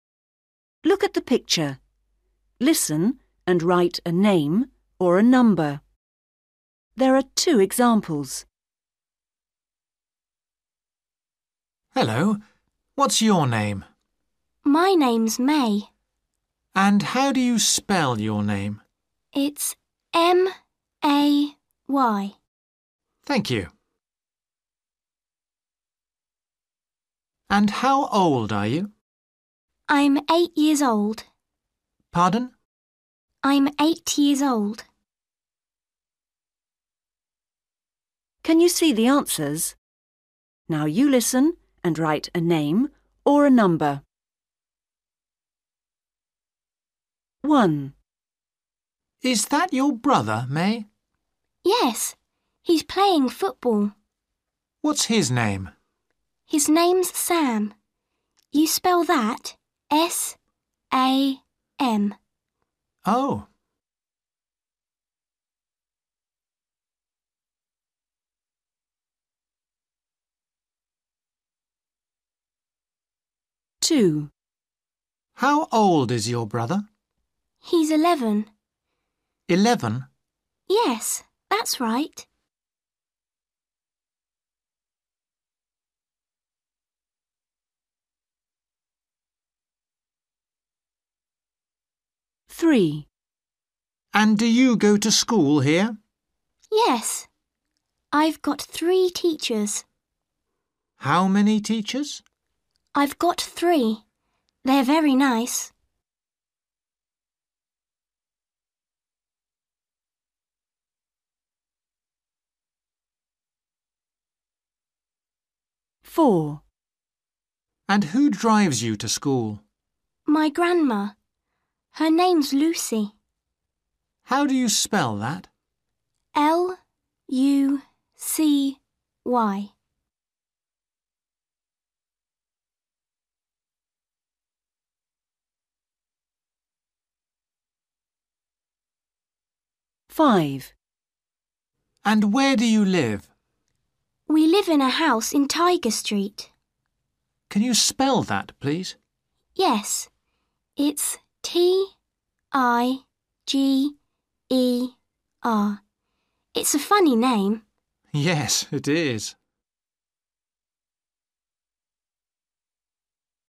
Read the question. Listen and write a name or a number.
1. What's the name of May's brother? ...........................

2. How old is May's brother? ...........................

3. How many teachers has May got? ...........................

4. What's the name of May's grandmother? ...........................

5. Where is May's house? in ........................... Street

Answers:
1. Sam
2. 11/eleven
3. 3
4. Lucy
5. Tiger

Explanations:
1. MAN: Is that your brother, May? GIRL: Yes. He's playing football. MAN: What's his name? GIRL: His name's Sam. You spell that S-A-M. MAN: Oh!
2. MAN: How old is your brother? GIRL: He's eleven. MAN: Eleven? GIRL: Yes, that's right.
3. MAN: And do you go to school here? GIRL: Yes. I've got three teachers. MAN: How many teachers? GIRL: I've got three. They're very nice.
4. MAN: And who drives you to school? GIRL: My grandma. Her name's Lucy. MAN: How do you spell that? GIRL: L-U-C-Y.
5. MAN: And where do you live? GIRL: We live in a house in Tiger Street. MAN: Can you spell that, please? GIRL: Yes. It's T-I-G-E-R. It's a funny name. MAN: Yes, it is!

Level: Starters